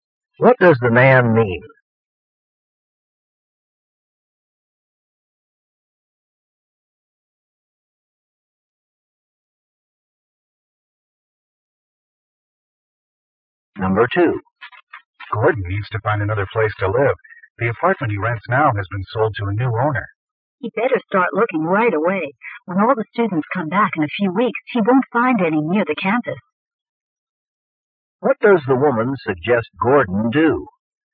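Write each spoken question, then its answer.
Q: What does the woman suggest Gordon do?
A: Start looking for a new place to live right away.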